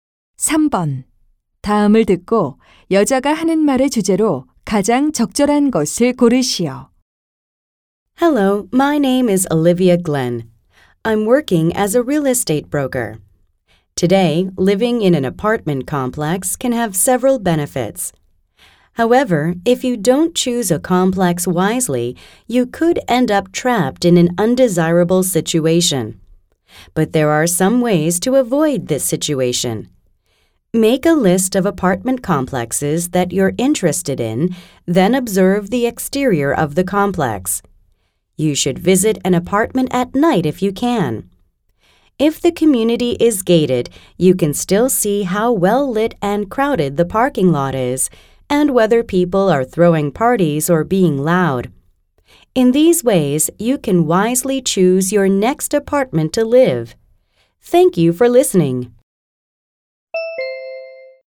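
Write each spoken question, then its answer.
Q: 다음을 듣고 여자가 하는 말의 주제로 가장 적절한 것을 고르시오.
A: 아파트 단지를 현명하게 고르는 방법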